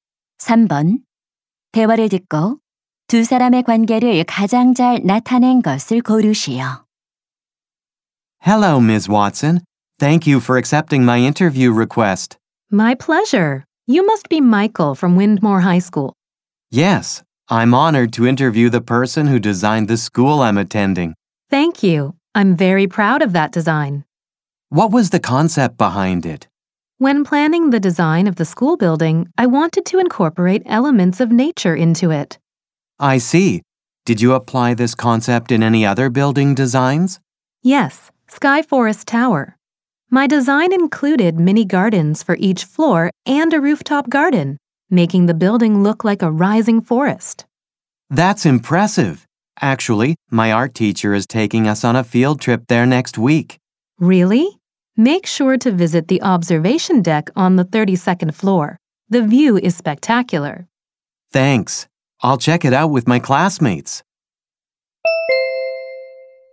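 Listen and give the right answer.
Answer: 건축가 — 학생 인터뷰 진행자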